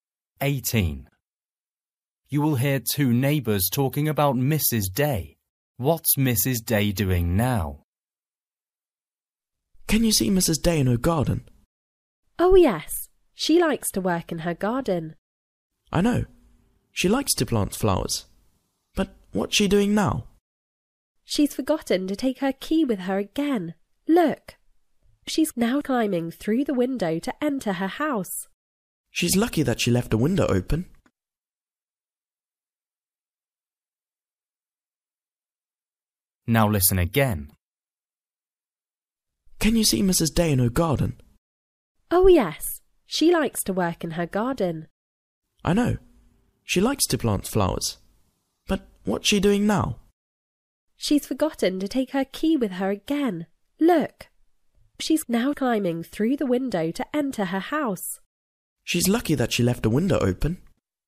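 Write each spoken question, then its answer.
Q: What's Mrs. Day doing now?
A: Climbing through the window into her house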